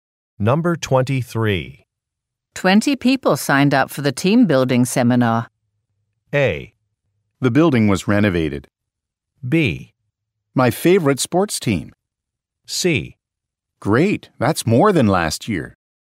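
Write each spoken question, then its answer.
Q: 20 people signed up for the team building seminar.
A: C: Great, that's more than last year.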